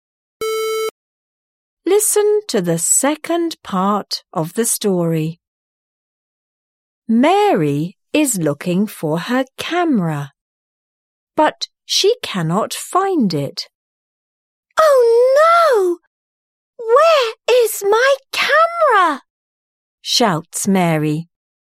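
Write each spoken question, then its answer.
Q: Who is looking for the camera?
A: Mary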